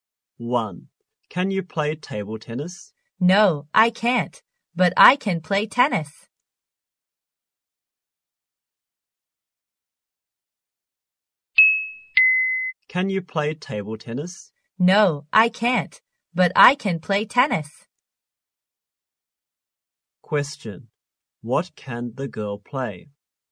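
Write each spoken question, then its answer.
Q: What can the girl play?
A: Tennis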